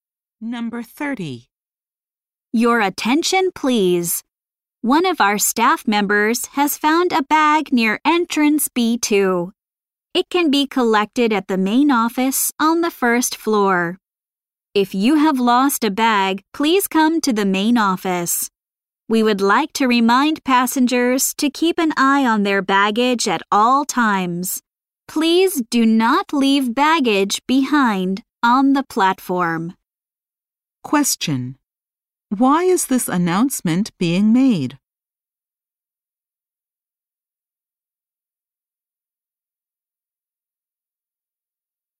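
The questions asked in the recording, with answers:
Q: Why is this announcement being made?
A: A bag was found near entrance B2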